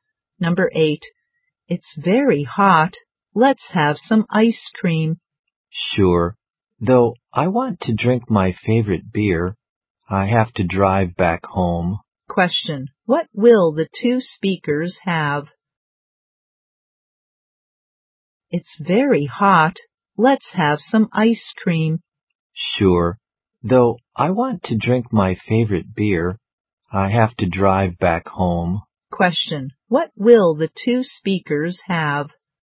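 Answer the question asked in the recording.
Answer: Ice cream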